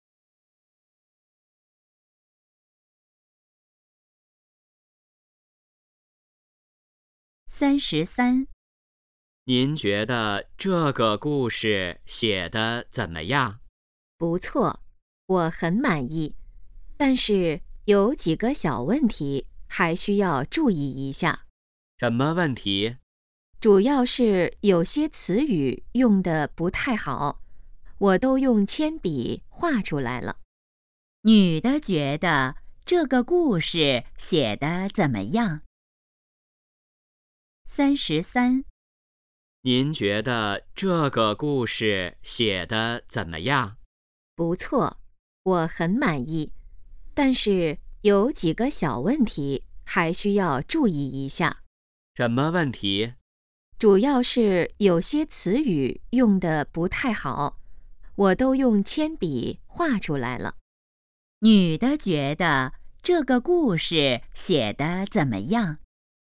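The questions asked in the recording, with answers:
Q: 女的觉得这个故事写得怎么样?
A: 不错,很满意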